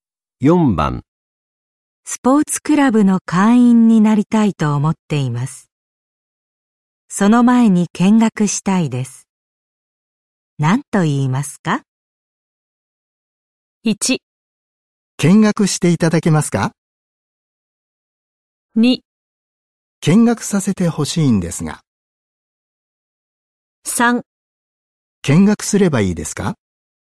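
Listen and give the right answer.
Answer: 2: 見学させてほしいんですが。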